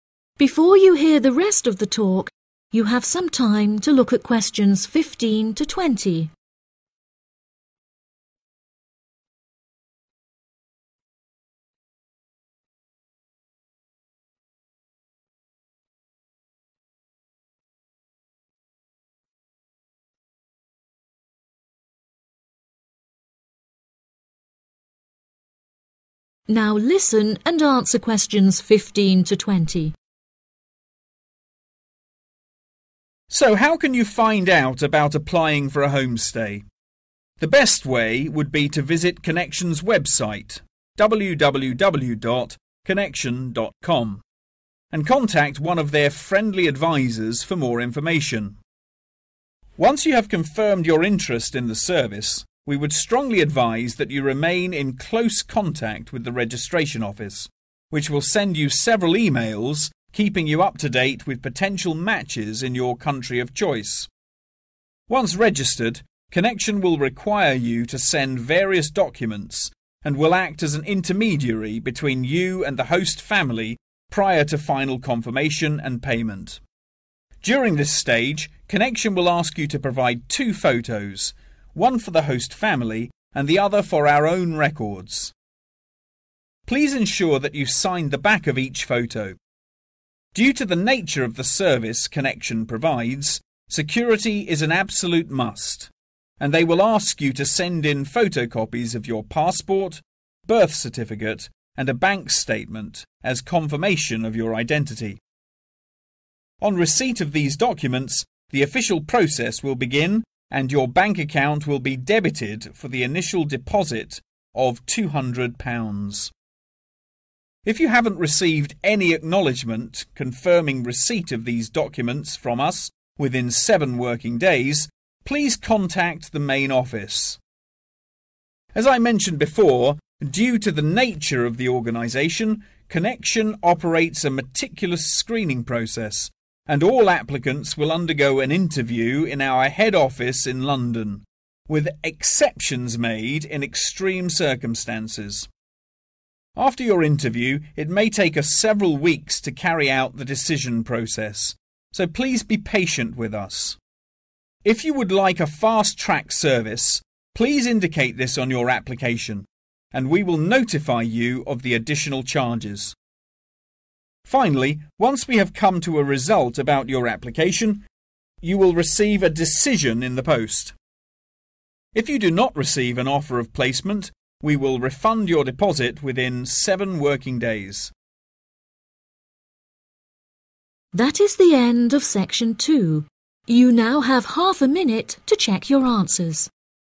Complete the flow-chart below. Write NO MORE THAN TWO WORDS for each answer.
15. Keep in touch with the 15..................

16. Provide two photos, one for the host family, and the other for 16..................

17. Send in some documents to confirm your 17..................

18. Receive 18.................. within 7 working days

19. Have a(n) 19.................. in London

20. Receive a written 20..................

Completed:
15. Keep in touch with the registration office
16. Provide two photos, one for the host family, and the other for (own) records
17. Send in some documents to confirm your identity
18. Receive acknowledgement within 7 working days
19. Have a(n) interview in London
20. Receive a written decision